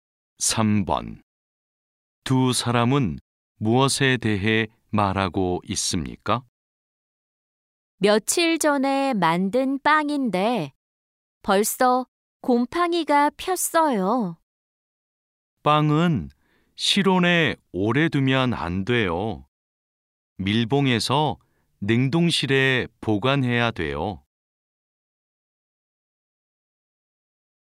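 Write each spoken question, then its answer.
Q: 두 사람은 무엇에 대해 말하고 있습니까?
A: 빵 보관 방법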